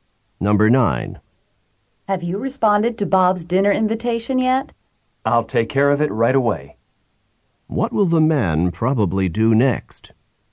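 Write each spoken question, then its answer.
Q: What will the man probably do next?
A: Respond to Bob's dinner invitation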